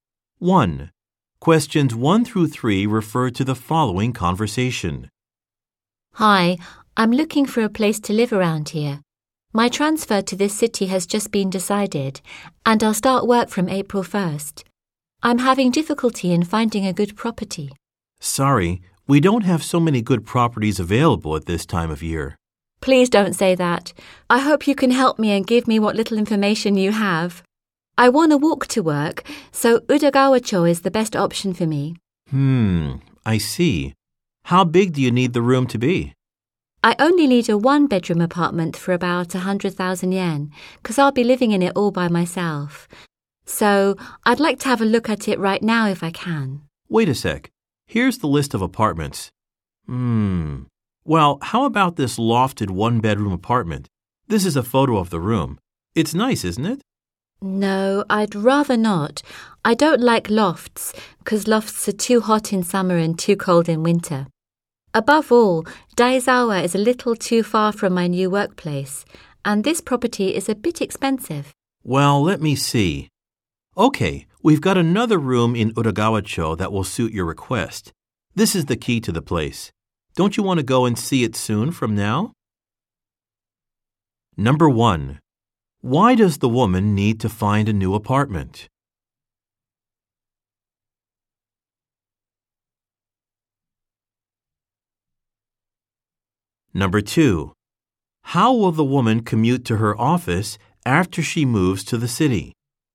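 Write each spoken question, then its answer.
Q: Why does the woman need to find a new apartment?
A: She has been transferred to this city and starts work on April 1st.

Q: How will the woman commute to her office after she moves to the city?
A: She will walk to work.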